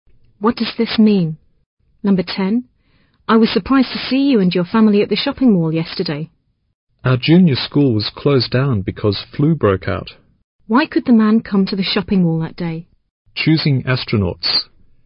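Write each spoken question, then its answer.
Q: Why could the man come to the shopping mall that day?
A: The school was closed because of a flu outbreak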